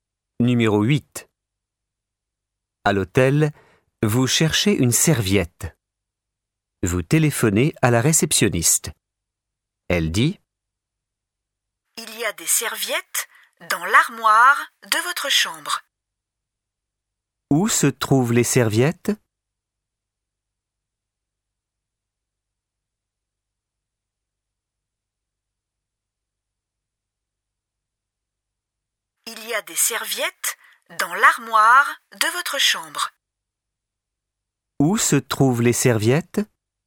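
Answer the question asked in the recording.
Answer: Dans l'armoire de la chambre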